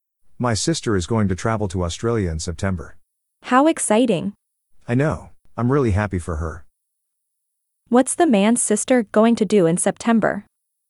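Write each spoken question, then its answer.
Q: What's the man's sister going to do in September?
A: Travel to Australia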